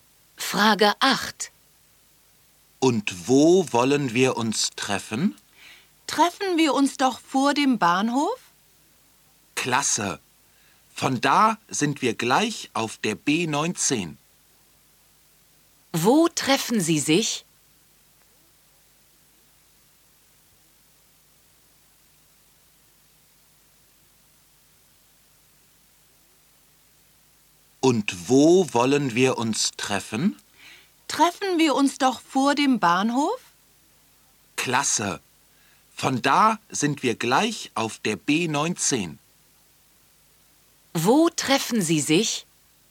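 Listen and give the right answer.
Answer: Vor dem Bahnhof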